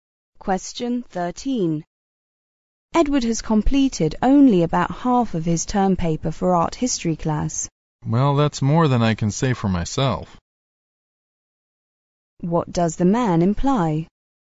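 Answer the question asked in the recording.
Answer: He has done less of his paper than Edward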